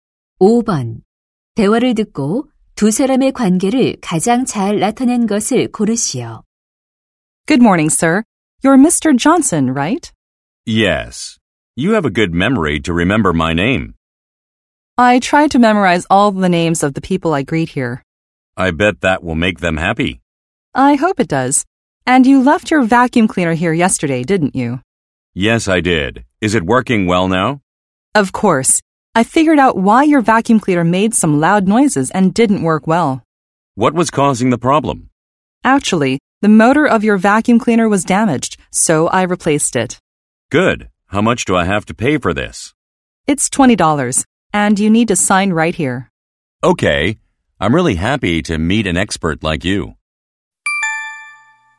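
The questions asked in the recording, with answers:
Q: 대화를 듣고 두 사람의 관계를 가장 잘 나타낸 것을 고르시오.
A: 고객 - 가전제품(진공청소기) 수리 기사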